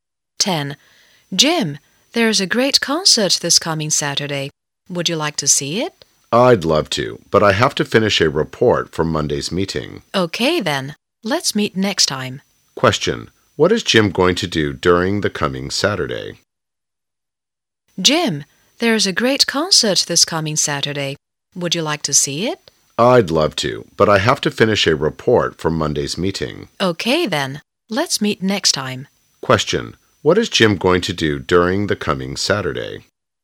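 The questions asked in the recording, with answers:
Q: What is Jim going to do during the coming Saturday?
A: Finish a report for Monday's meeting.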